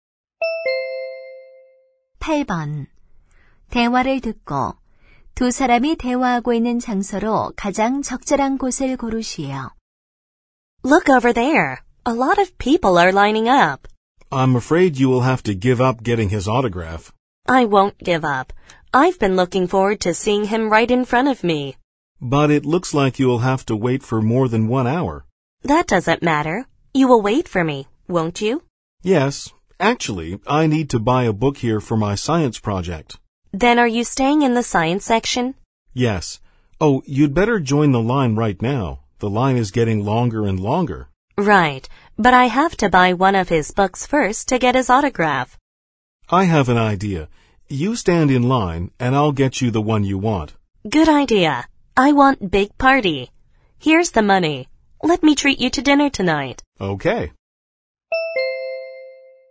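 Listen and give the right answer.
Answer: 서점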